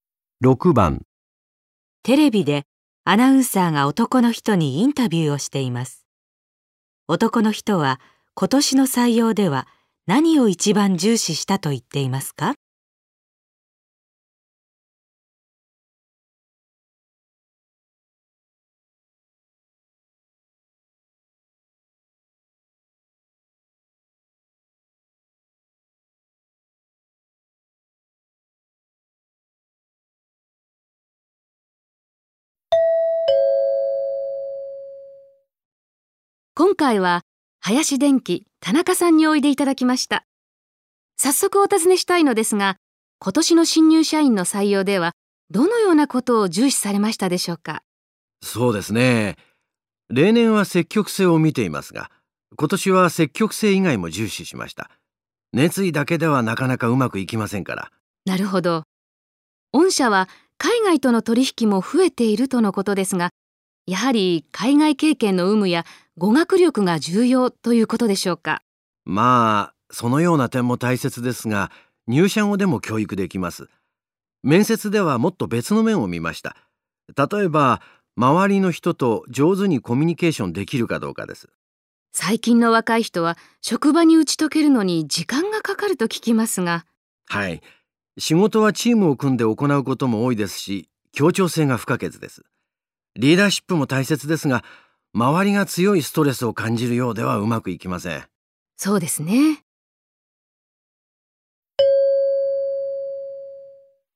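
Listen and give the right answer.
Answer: 協調性(周りの人と上手にコミュニケーションできるか)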